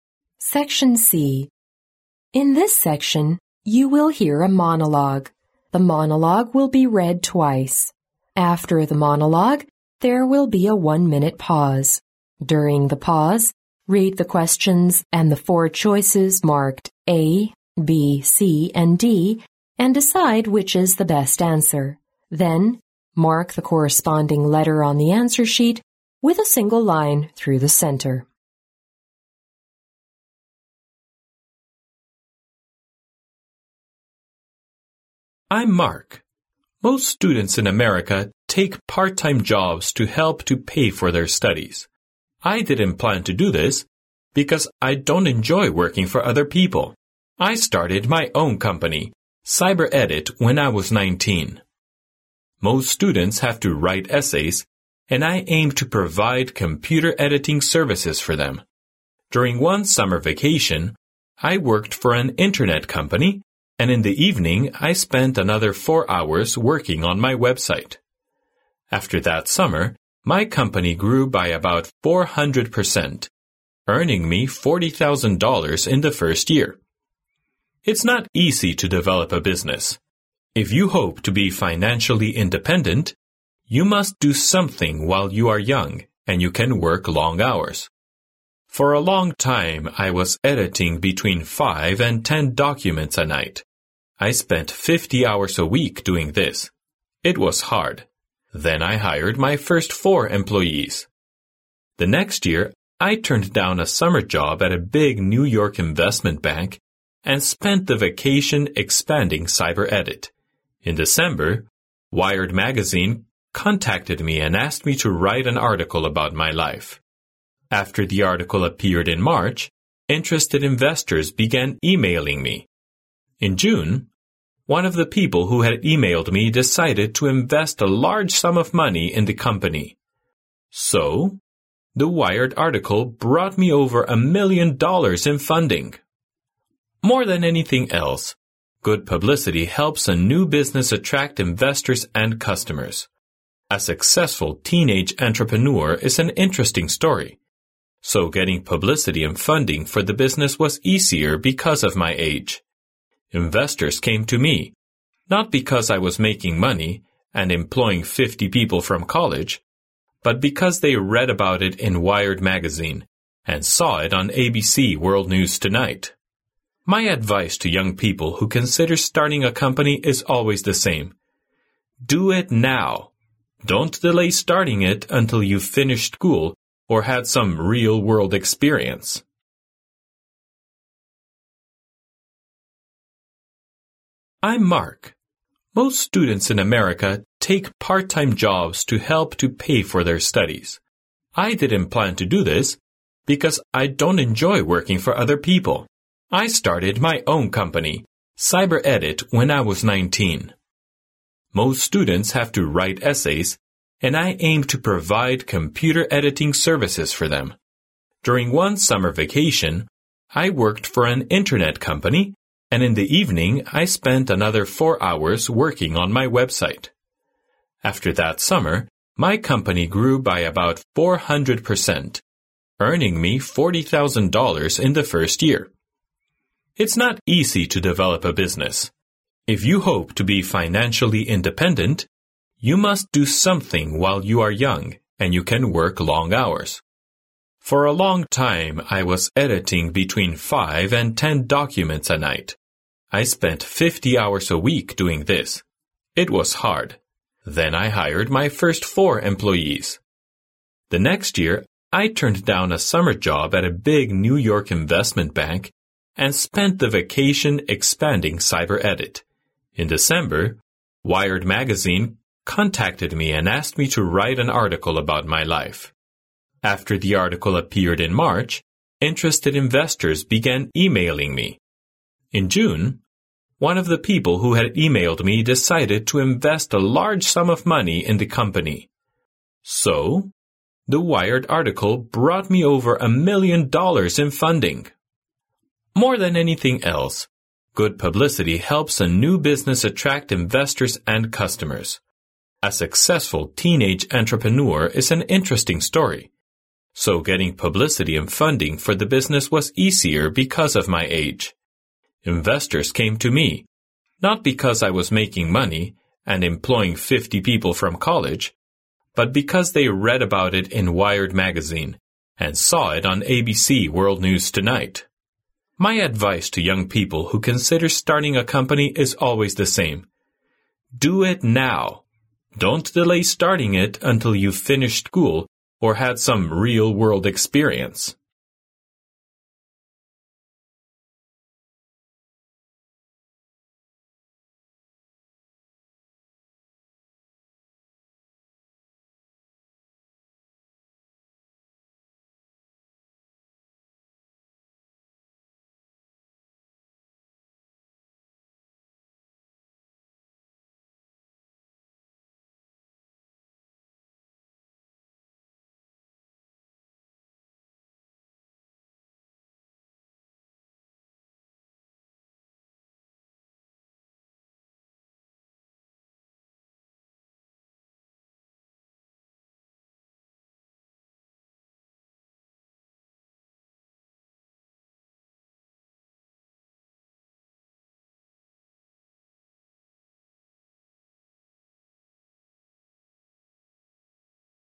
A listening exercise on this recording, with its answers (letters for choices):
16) What does the company CyberEdit aim to do?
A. Provide computer editing services for students.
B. Write essays for students.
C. Edit documents for Wired magazine.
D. Supply funding for businesses.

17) How much did Mark earn in the first year?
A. $400.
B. $4,000.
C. $40,000.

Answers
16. A
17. C

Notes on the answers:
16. 录音中提到Mark在十九岁的时候创建了CyberEdit,接着后面Mark提到"I aimed to provide computer editing services for them.",由此可知CyberEdit致力于为学生提供电脑编辑服务,因此A为正确选项。
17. 录音中Mark提到"earning me $40,000 in the first year .",由此可知,Mark第一年挣了四万美元,C为正确选项。

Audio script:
Most students in America take part-time jobs to help to pay for their studies. I didn't plan to do this because I don't enjoy working for other people. I started my own company, CyberEdit, when I was 19. Most students have to write essays, and I aimed to provide computer editing services for them. During one summer vacation, I worked for an Internet company and in the evening, I spent another four hours working on my website. After that summer, my company grew by about 400%, earning me $40,000 in the first year.
It's not easy to develop a business. If you hope to be financially independent, you must do something while you are young and you can work long hours. For a long time, I was editing between five and ten documents a night. I spent fifty hours a week doing this. It was hard. Then I hired my first four employees.
The next year, I turned down a summer job at a big New York investment bank and spent the vacation expanding CyberEdit. In December, Wired magazine contacted me and asked me to write an article about my life. After the article appeared in March, interested investors began emailing me. In June, one of the people who had emailed me decided to invest a large sum of money in the company. So... the Wired article brought me over a million dollars in funding!
More than anything else, good publicity helps a new business attract investors and customers. A successful teenage entrepreneur is an interesting story, so getting publicity and funding for the business was easier because of my age. Investors came to me, not because I was making money and employing fifty people from college, but because they read about it in Wired magazine, and saw it on ABC World News Tonight.
My advice to young people who consider starting a company is always the same: Do it now! Don't delay starting it until you've finished school or had some "real-world experience".
Section D (10 marks)